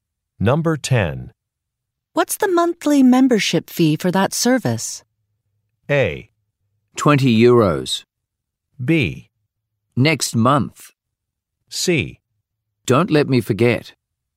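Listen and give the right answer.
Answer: A: 20 euros.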